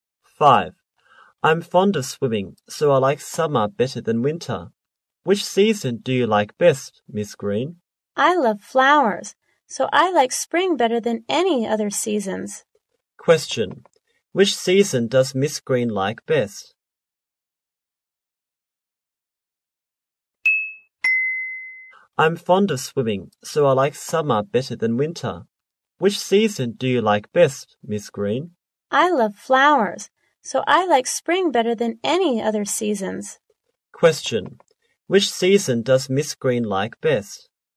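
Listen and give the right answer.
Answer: Spring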